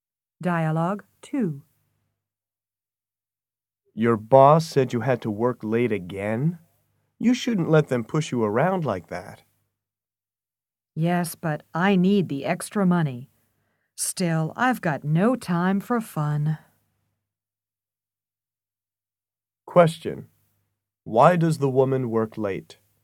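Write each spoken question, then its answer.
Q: Why does the woman work late?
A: She needs the extra money.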